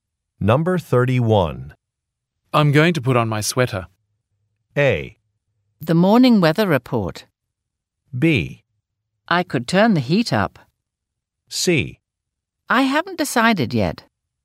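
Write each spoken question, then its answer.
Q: I'm going to put on my sweater.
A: B: I could turn the heat up.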